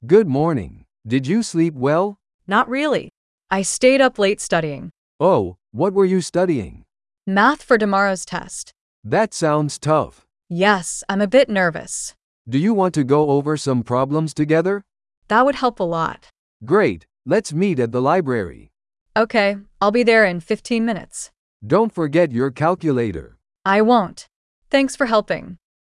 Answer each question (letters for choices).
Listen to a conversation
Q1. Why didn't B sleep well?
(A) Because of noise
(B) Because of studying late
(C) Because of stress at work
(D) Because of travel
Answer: B

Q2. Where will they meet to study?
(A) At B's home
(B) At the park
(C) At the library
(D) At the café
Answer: C

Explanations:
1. B mentions staying up late studying.
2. They plan to meet at the library.